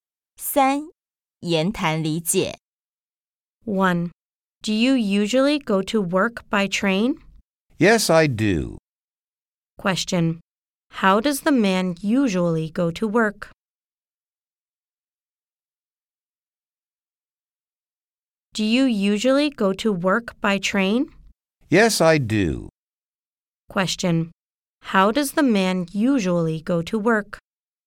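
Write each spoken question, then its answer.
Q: How does the man usually go to work?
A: By train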